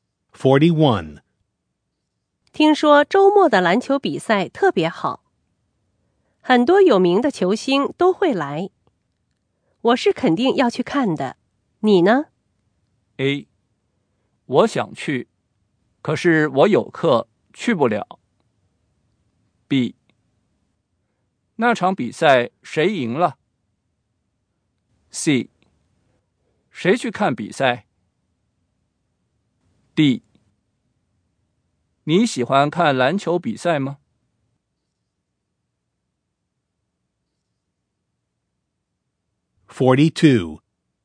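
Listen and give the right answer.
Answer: A: 我想去,可是我有课,去不了。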